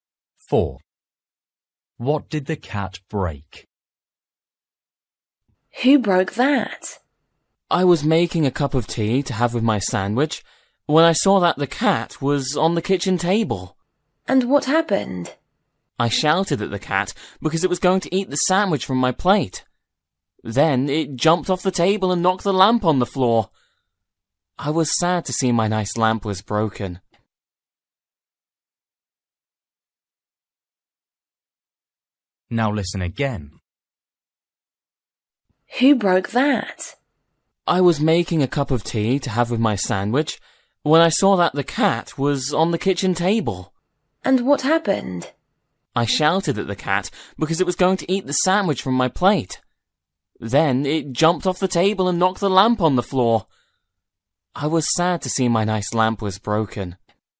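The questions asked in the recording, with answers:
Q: What did the cat break?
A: A lamp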